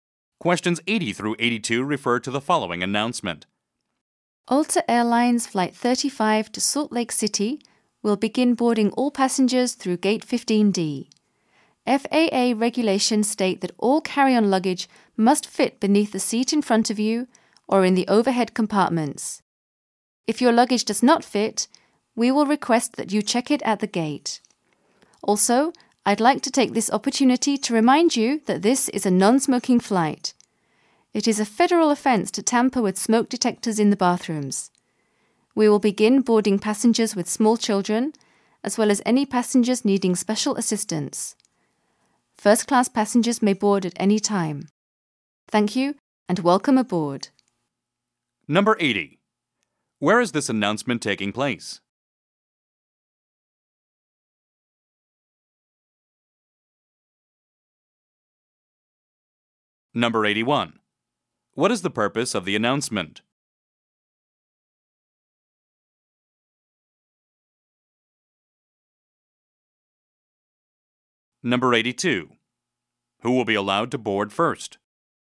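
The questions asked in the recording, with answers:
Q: Where is this announcement taking place?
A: At an airport gate

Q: What is the purpose of the announcement?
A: To announce boarding

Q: Who will be allowed to board first?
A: Passengers with small children or needing special assistance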